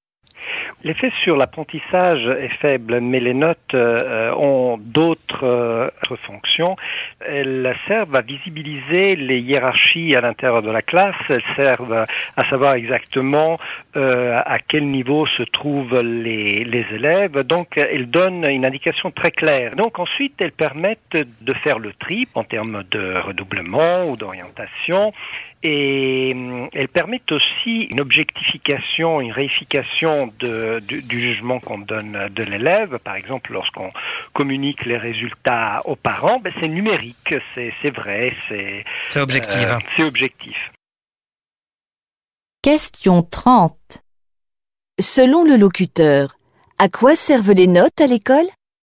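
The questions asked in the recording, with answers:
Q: Selon le locuteur, à quoi servent les notes à l'école?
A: À classer les élèves et objectiver le jugement (tri, orientation)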